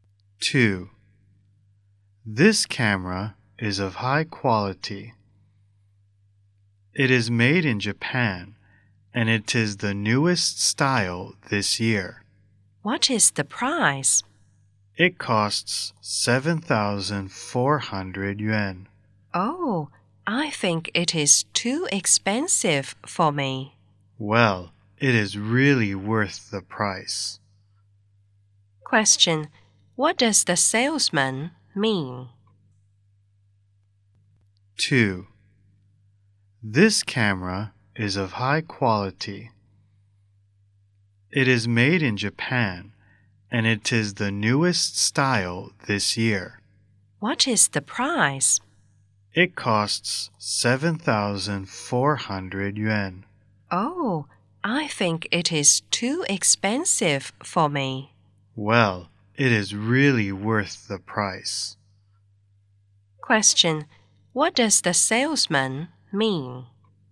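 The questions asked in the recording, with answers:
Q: What does the salesman mean?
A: The camera is really worth the price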